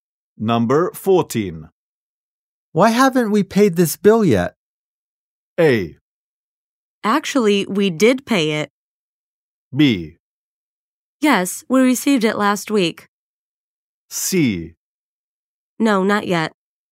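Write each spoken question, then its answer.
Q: Why haven't we paid this bill yet?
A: A: Actually, we did pay it.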